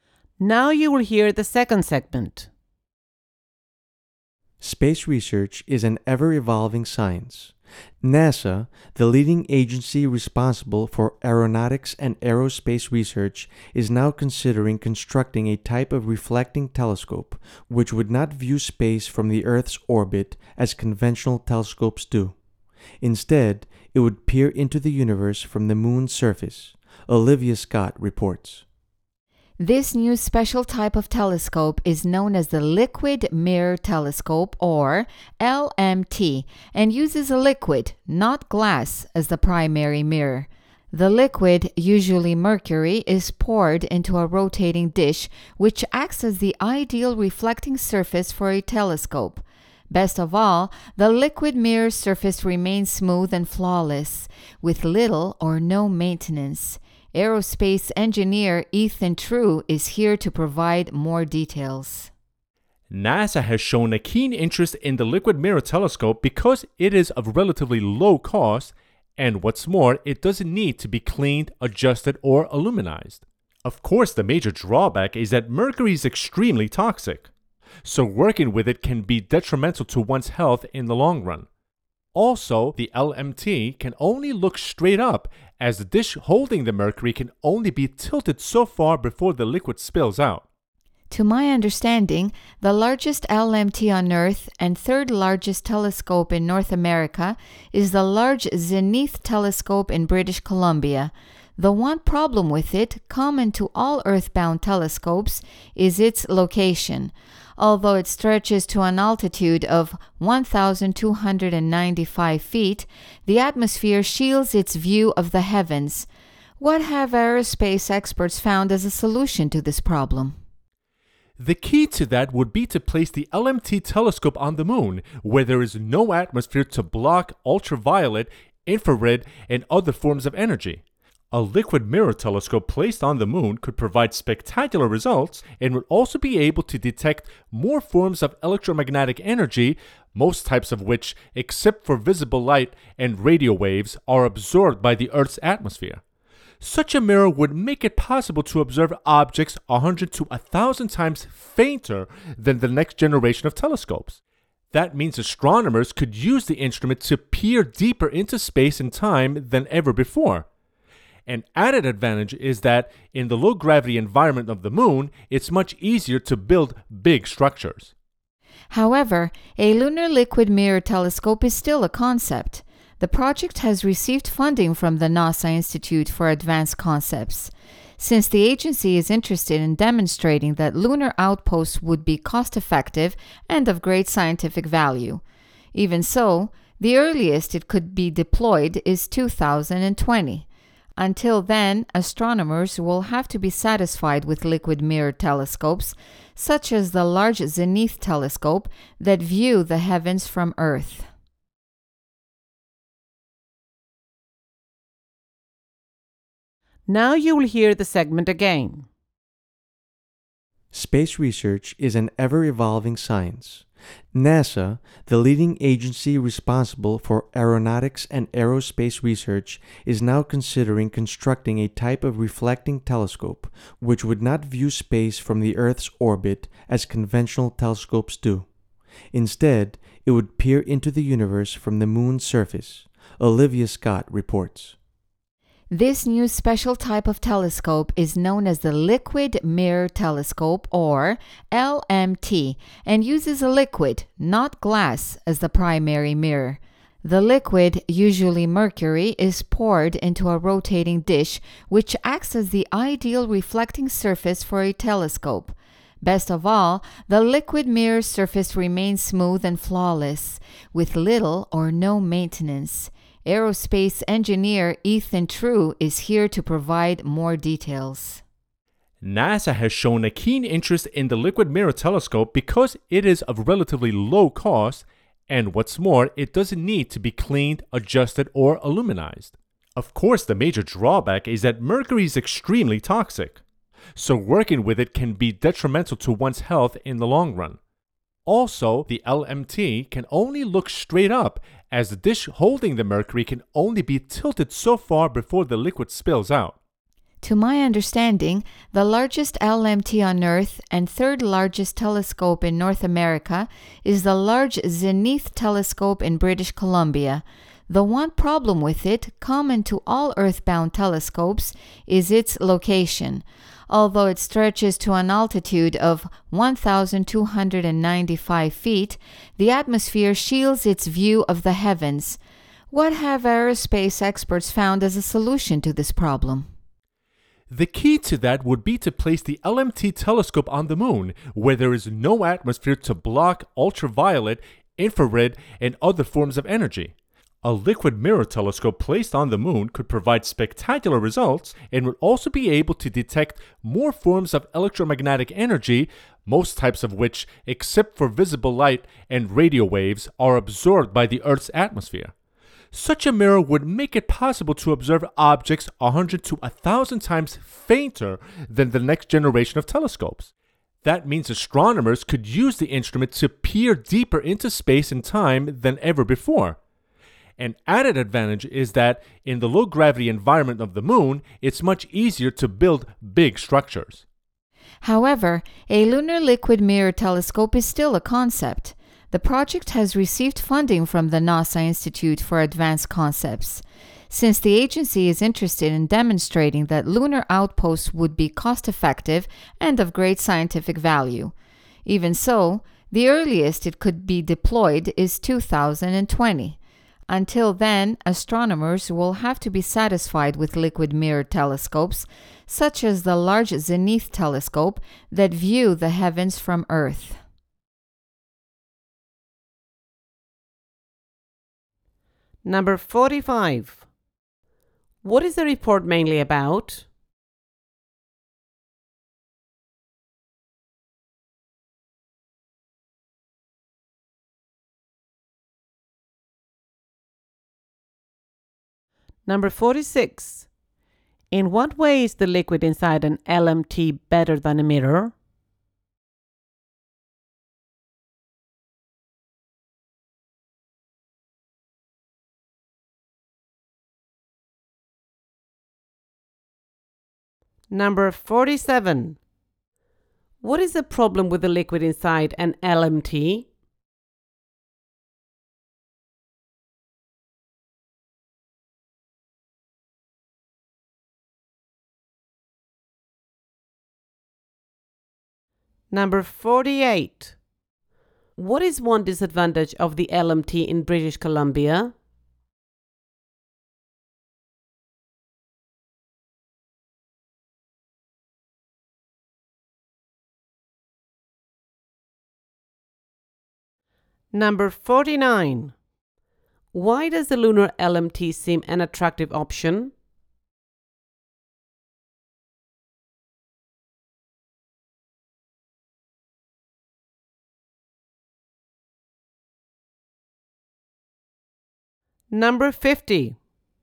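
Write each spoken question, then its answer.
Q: What is the report mainly about?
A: A liquid mirror telescope NASA may place on the moon

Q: In what way is the liquid inside an LMT better than a mirror?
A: Its surface stays smooth and flawless and needs little or no maintenance.

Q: What is the problem with the liquid inside an LMT?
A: Mercury is extremely toxic.

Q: What is one disadvantage of the LMT in British Columbia?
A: The atmosphere blocks its view of the sky.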